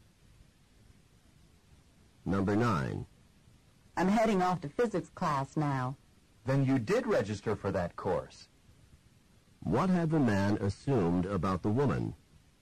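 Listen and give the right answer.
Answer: That she had not registered for physics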